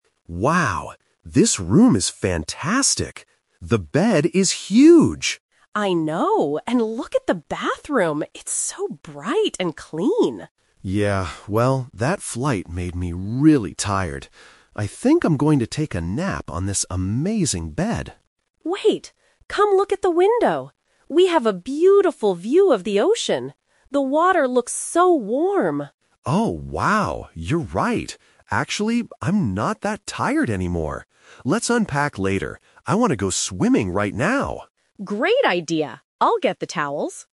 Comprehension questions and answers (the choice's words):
Listen to a husband and wife talking in their hotel room. Choose the correct answer (A, B, or C) for each question.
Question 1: What does the wife say about the bathroom?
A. It is very big.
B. It is bright and clean.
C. It has clean towels.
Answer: It is bright and clean.

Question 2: What do they decide to do next?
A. Sleep on the bed.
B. Unpack their bags.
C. Go to the beach.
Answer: Go to the beach.

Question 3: Why did the husband change his plan?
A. He saw the beautiful ocean outside.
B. The hotel bed was too small.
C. He needed to find his swimsuit.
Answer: He saw the beautiful ocean outside.

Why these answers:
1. The wife explicitly says, "It's so bright and clean" when looking at the bathroom.
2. This is the "Twist". The husband says, "I want to go swimming right now!" and the wife agrees. "Going swimming" means they are going to the beach/ocean.
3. The wife points out the "beautiful view of the ocean", which makes the husband say "I'm not that tired anymore" and decide to go swimming.

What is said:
Husband: Wow, this room is fantastic! The bed is huge.
Wife: I know! And look at the bathroom. It's so bright and clean.
Husband: Yeah. Well, that flight made me really tired. I think I'm going to take a nap on this amazing bed.
Wife: Wait, come look at the window! We have a beautiful view of the ocean! The water looks so warm.
Husband: Oh, wow... You're right. Actually, I'm not that tired anymore. Let's unpack later. I want to go swimming right now!